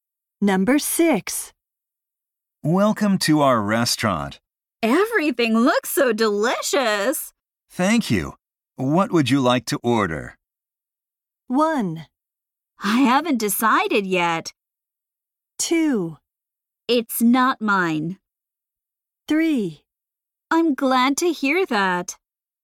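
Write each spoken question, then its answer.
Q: Thank you. What would you like to order?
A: 1: I haven't decided yet.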